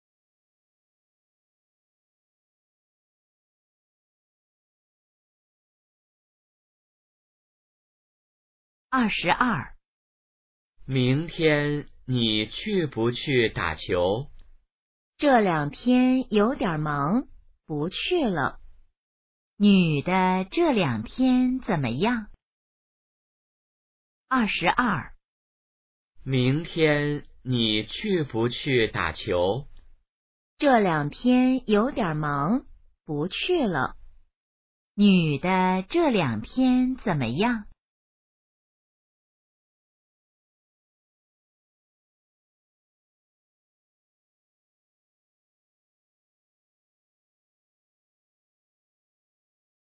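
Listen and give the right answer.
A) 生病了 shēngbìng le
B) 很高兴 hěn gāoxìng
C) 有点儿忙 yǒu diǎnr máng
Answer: C) 有点儿忙 yǒu diǎnr máng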